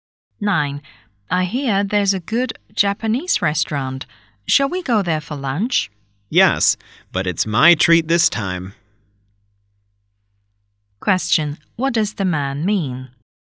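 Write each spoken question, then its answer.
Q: What does the man mean?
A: He will pay for the lunch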